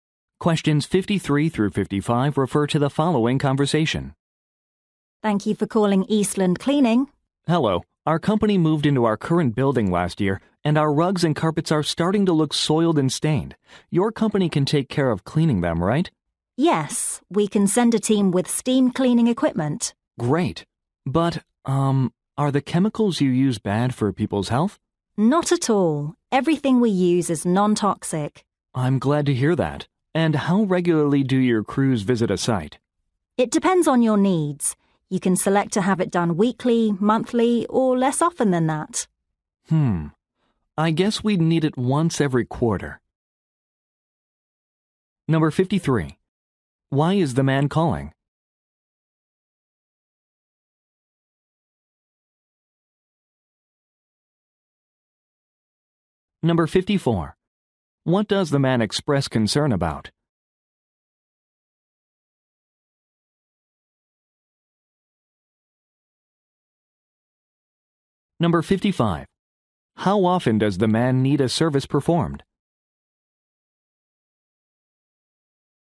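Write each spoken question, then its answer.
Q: Why is the man calling?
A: To get rugs and carpets cleaned

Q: What does the man express concern about?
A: Whether the chemicals are harmful to health

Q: How often does the man need a service performed?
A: Once every quarter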